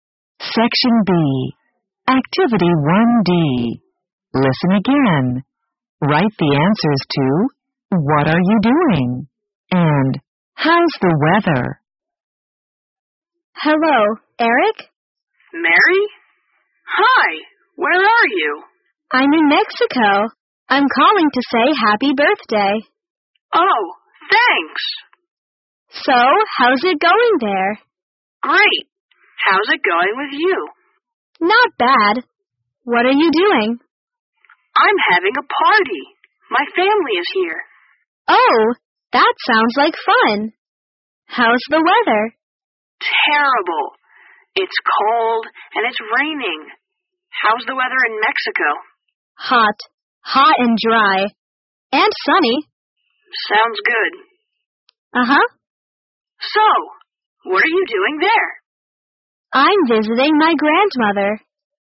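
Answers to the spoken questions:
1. Eric: having a party with his family; Mary: visiting her grandmother in Mexico
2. Eric: terrible, cold and raining; Mary (Mexico): hot, dry and sunny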